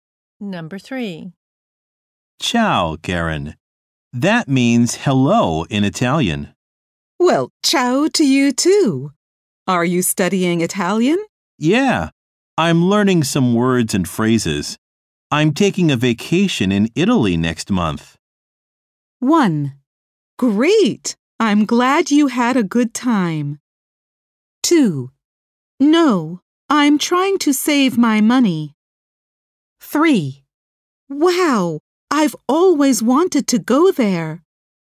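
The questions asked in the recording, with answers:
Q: I'm taking a vacation in Italy next month.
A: 3: Wow, I've always wanted to go there.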